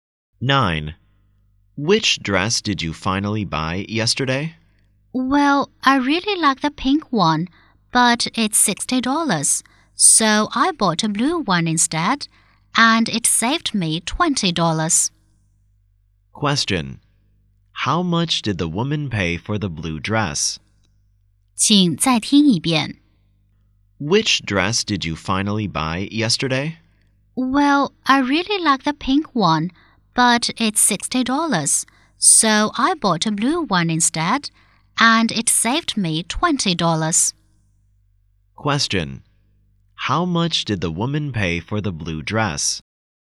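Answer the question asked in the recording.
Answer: $40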